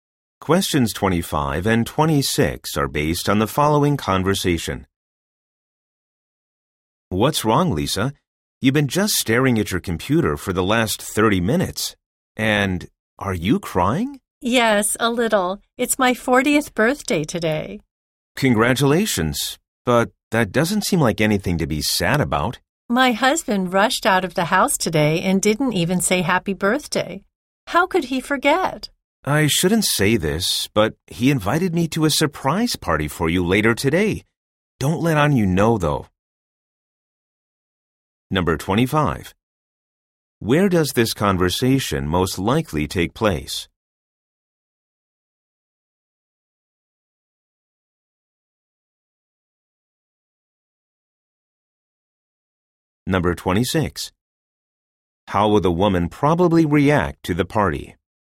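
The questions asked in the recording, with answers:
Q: Where does this conversation most likely take place?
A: At the office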